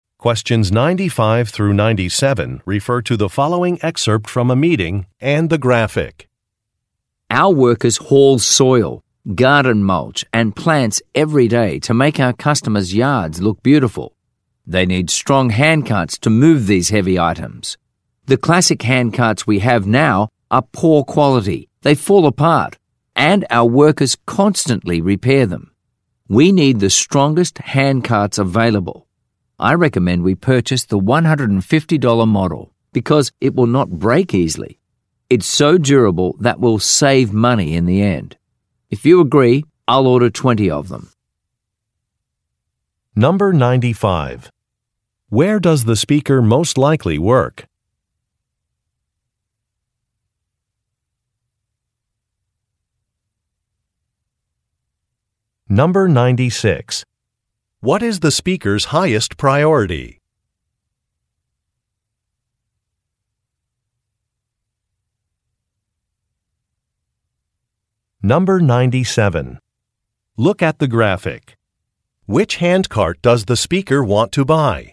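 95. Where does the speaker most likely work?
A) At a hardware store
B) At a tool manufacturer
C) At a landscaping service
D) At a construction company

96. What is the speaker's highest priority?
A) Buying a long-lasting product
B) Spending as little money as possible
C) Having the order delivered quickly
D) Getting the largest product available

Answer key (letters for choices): 95C, 96A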